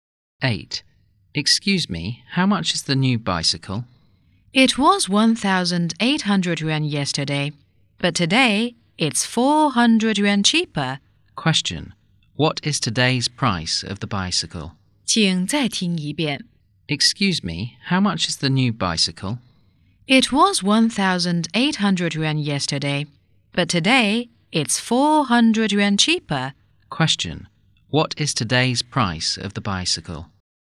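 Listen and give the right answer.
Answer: 1,400 yuan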